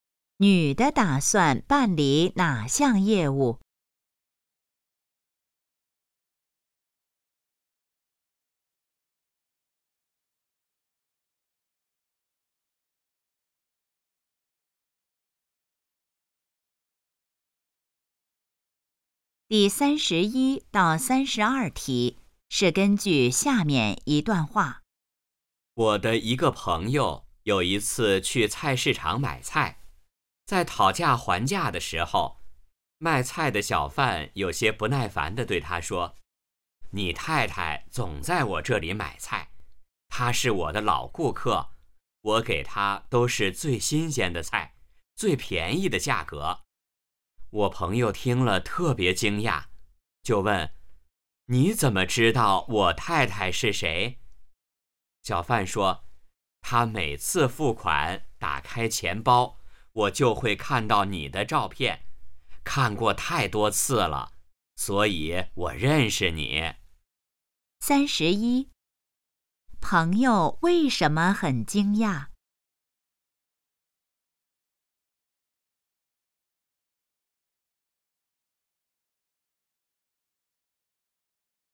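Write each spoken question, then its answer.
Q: 关于朋友的太太,可以知道什么?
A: 常在那个小贩那里买菜,钱包里有丈夫的照片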